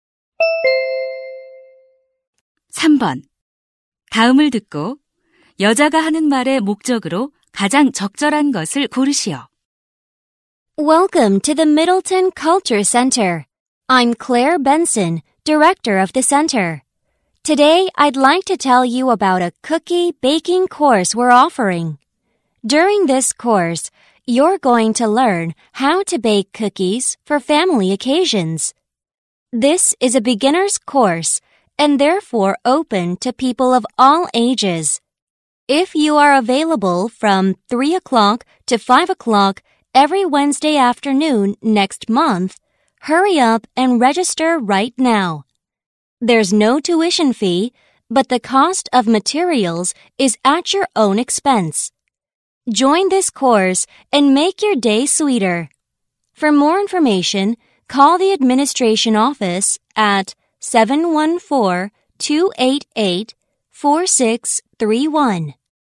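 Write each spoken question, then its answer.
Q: 다음을 듣고 여자가 하는 말의 목적으로 가장 적절한 것을 고르시오.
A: 쿠키 굽기 강좌를 홍보하고 등록을 권하려고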